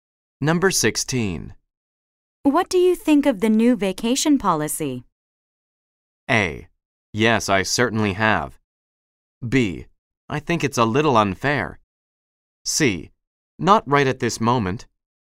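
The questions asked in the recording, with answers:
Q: What do you think of the new vacation policy?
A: B: I think it's a little unfair.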